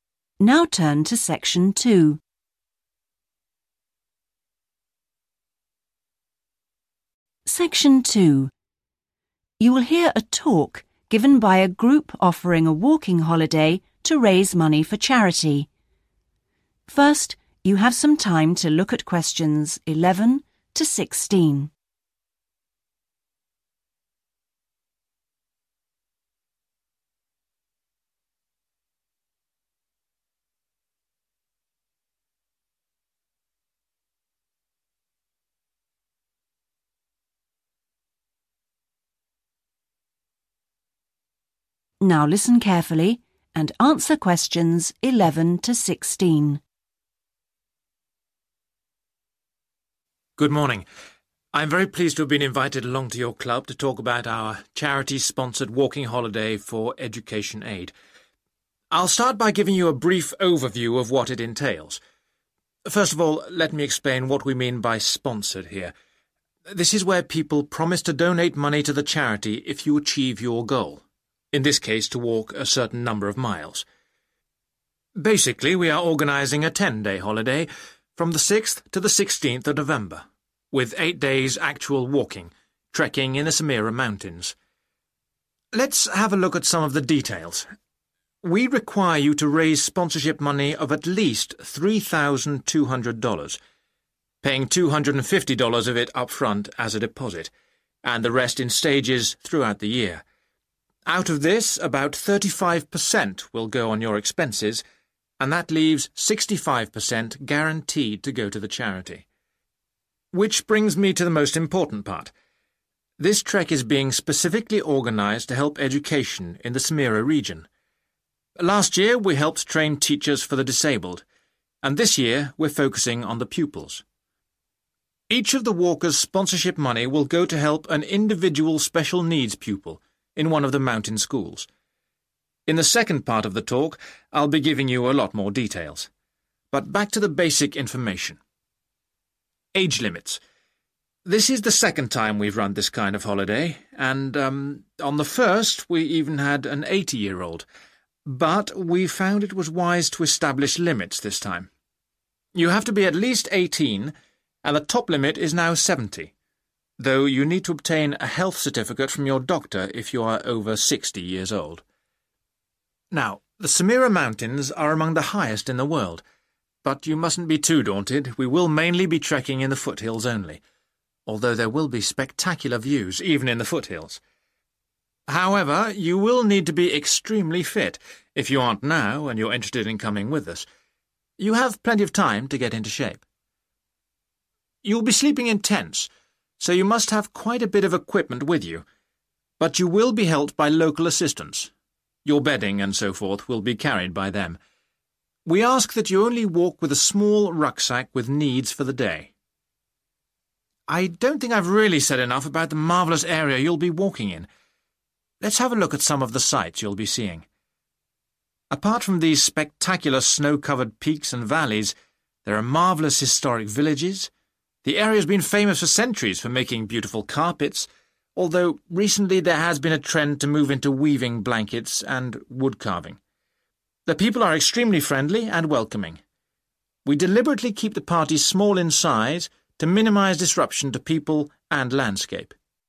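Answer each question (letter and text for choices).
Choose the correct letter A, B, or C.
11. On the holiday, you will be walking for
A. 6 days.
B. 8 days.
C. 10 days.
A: B. 8 days.

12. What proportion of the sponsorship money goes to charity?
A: 65%

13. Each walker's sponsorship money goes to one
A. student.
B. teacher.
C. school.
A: A. student.

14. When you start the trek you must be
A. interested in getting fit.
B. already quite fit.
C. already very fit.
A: C. already very fit.

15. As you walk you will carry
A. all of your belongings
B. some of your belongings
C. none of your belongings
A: B. some of your belongings

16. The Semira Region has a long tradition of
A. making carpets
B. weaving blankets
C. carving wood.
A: A. making carpets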